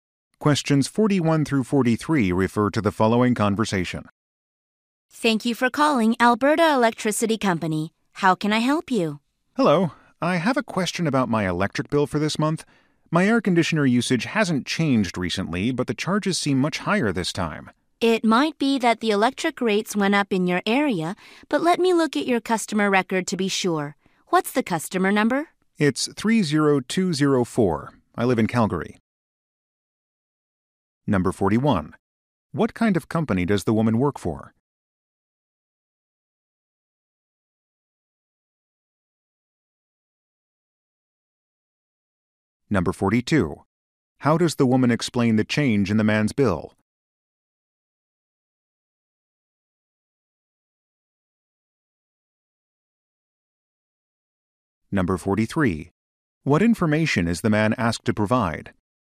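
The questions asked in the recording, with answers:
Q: What kind of company does the woman work for?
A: An electricity company

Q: How does the woman explain the change in the man's bill?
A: Electric rates may have gone up in his area

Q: What information is the man asked to provide?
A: His customer number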